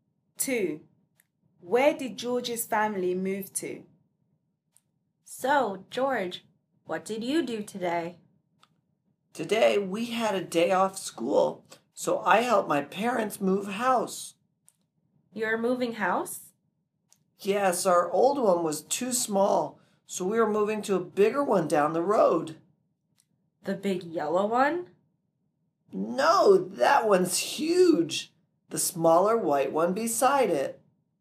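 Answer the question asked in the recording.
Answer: The smaller white house beside the big yellow one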